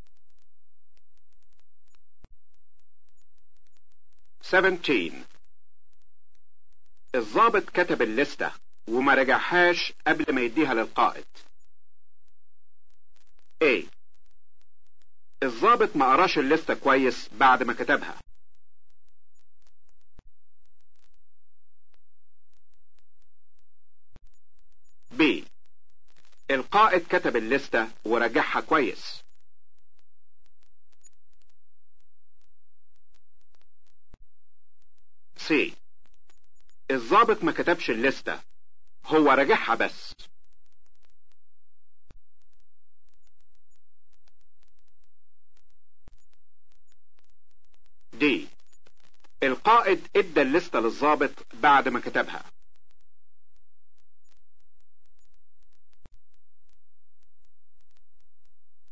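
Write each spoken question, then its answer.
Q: الضابط كتب الليستة وما رجعهاش قبل ما يديها للقائد.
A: A: الضابط ما قراش الليستة كويس بعد ما كتبها.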